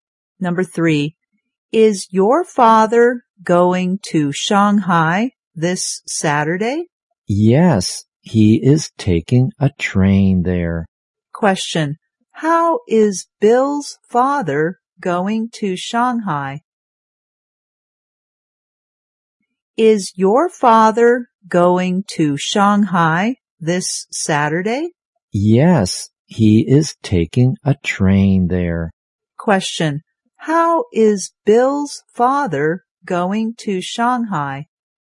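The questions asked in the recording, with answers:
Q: how is Bill's father going to Shanghai?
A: By train.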